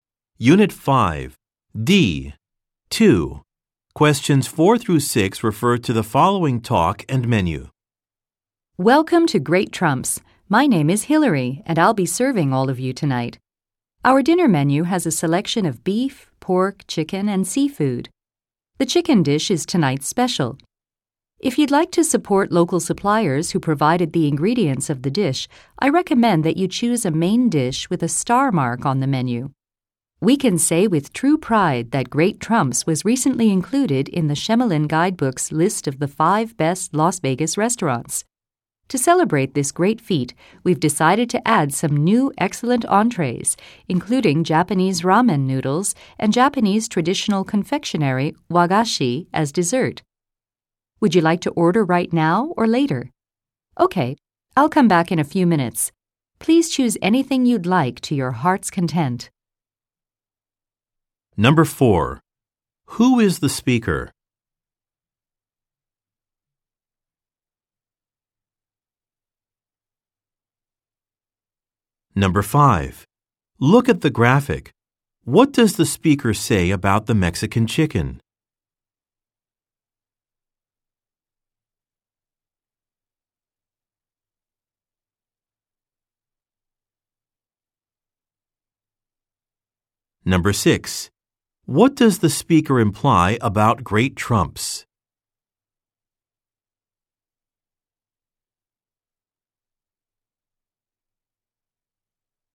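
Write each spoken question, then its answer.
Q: Who is the speaker?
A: A server at the restaurant

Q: What does the speaker imply about Great Trumps?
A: It was recently listed among the 5 best Las Vegas restaurants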